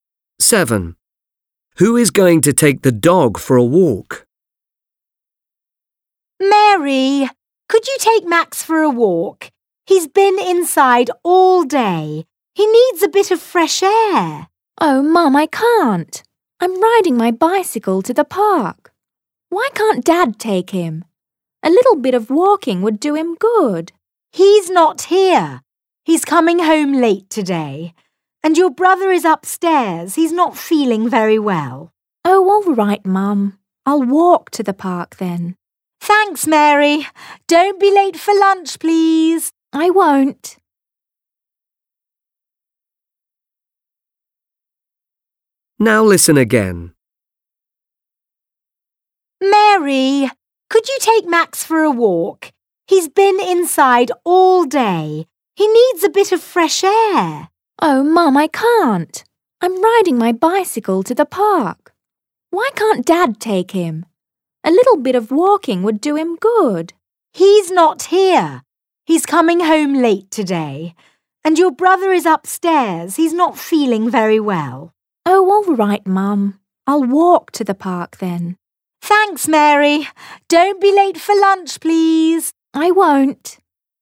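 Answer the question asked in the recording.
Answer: Mary (the girl)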